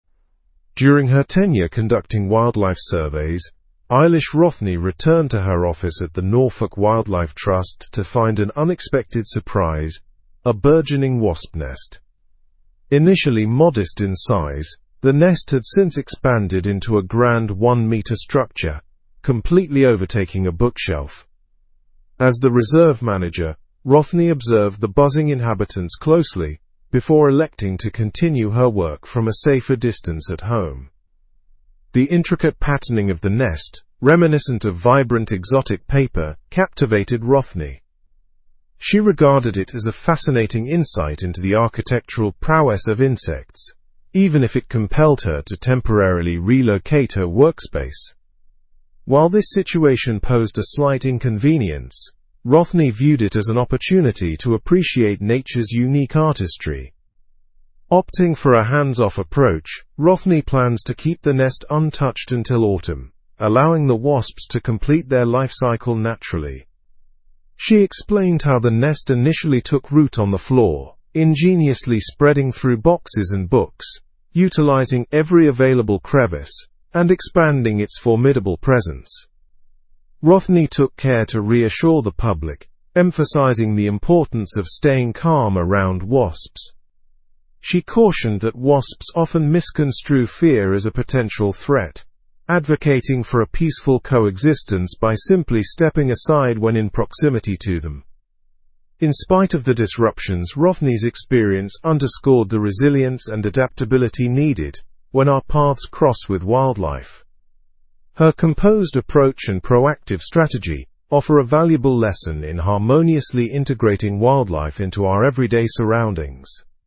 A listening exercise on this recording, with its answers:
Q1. What phenomenon did Rothney find upon returning to her office?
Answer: A burgeoning wasp nest.

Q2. How did the size of the wasp nest change over time?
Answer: It expanded from a modest size to a one-meter structure.

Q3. What action did Rothney take due to the wasp nest?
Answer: She decided to work from home.

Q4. What did Rothney find fascinating about the wasp nest?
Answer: The intricate patterning resembling vibrant, exotic paper.

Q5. Until when does Rothney plan to leave the nest undisturbed?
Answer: Until autumn, after the wasps complete their lifecycle.

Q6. How did Rothney reassure the public regarding wasps?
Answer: She emphasized the importance of remaining calm to avoid provoking them.

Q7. What lesson does Rothney's experience highlight?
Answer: It underscores the need for resilience and adaptability when interacting with wildlife.

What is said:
During her tenure conducting wildlife surveys, Eilish Rothney returned to her office at the Norfolk Wildlife Trust to find an unexpected surprise — a burgeoning wasp nest. Initially modest in size, the nest had since expanded into a grand one-meter structure, completely overtaking a bookshelf. As the reserve manager, Rothney observed the buzzing inhabitants closely before electing to continue her work from a safer distance at home.
The intricate patterning of the nest, reminiscent of vibrant, exotic paper, captivated Rothney. She regarded it as a fascinating insight into the architectural prowess of insects, even if it compelled her to temporarily relocate her workspace. While this situation posed a slight inconvenience, Rothney viewed it as an opportunity to appreciate nature's unique artistry.
Opting for a hands-off approach, Rothney plans to keep the nest untouched until autumn, allowing the wasps to complete their lifecycle naturally. She explained how the nest initially took root on the floor, ingeniously spreading through boxes and books, utilizing every available crevice and expanding its formidable presence.
Rothney took care to reassure the public, emphasizing the importance of staying calm around wasps. She cautioned that wasps often misconstrue fear as a potential threat, advocating for a peaceful coexistence by simply stepping aside when in proximity to them.
In spite of the disruptions, Rothney's experience underscored the resilience and adaptability needed when our paths cross with wildlife. Her composed approach and proactive strategy offer a valuable lesson in harmoniously integrating wildlife into our everyday surroundings.

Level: Level 4